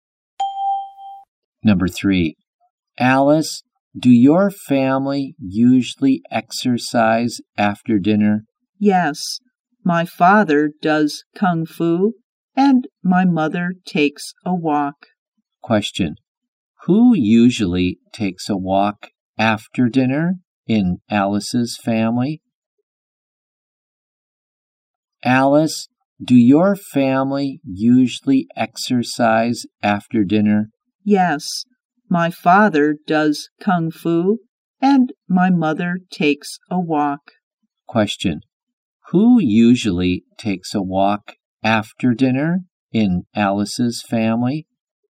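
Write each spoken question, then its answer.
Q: who usually takes a walk after dinner in Alice's family?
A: Her mother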